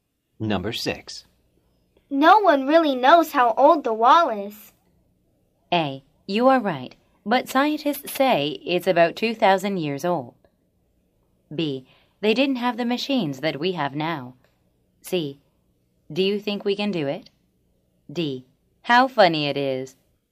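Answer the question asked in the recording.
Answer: A: You are right, but scientists say it's about 2,000 years old.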